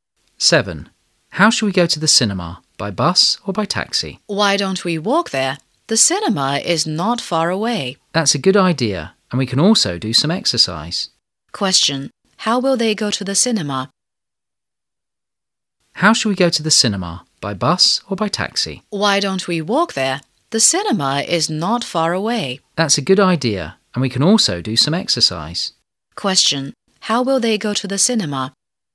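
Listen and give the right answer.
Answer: On foot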